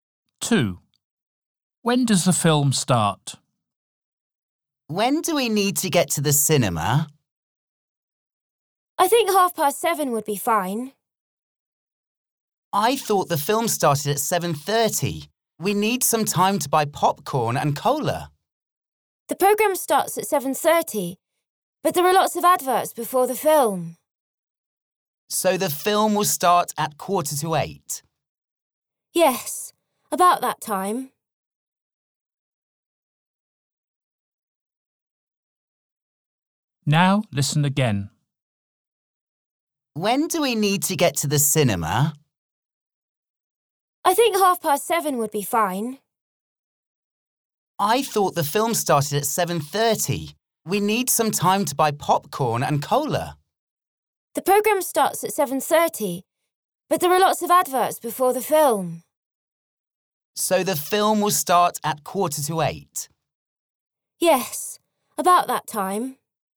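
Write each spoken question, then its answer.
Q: When does the film start?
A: At about 7:45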